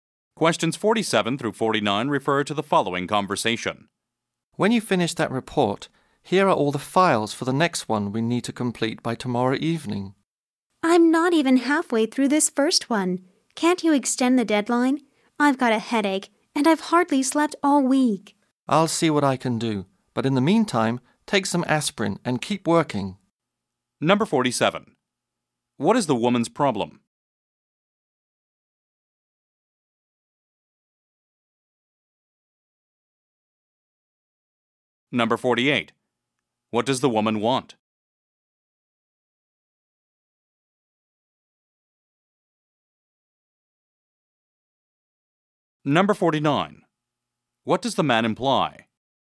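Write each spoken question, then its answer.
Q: What does the woman want?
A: An extended deadline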